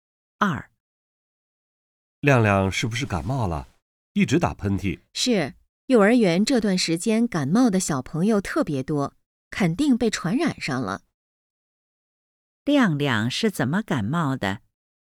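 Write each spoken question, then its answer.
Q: 亮亮是怎么感冒的?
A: 被幼儿园的小朋友传染的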